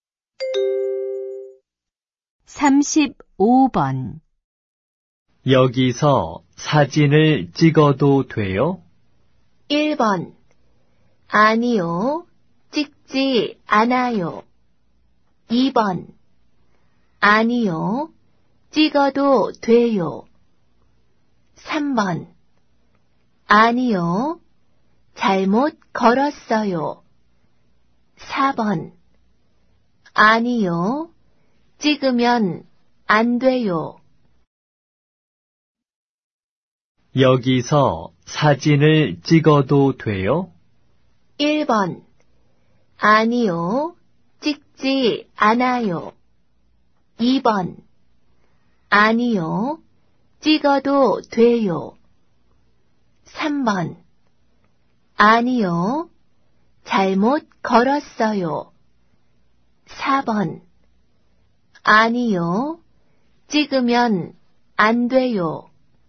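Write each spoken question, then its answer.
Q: 여기서 사진을 찍어도 돼요?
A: 4: 아니요, 찍으면 안 돼요.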